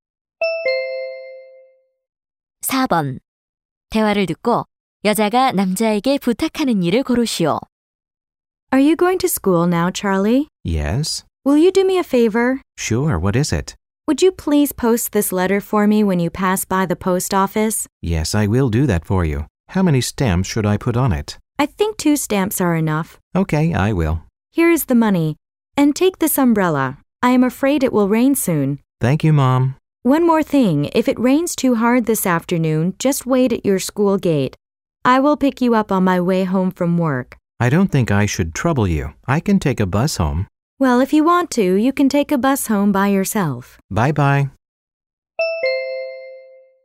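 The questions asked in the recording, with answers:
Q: 대화를 듣고 여자가 남자에게 부탁하는 일을 고르시오.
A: 편지 부치기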